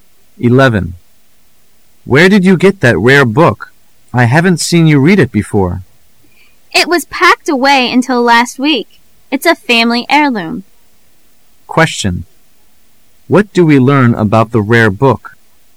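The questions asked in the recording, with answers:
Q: What do we learn about the rare book?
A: It is a family heirloom that had been packed away until last week

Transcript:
A
[解析] M: Where did you get that rare book? I haven't seen you read it before. W: It was packed away until last week. It's a family heirloom. Q: What do we learn about the rare book?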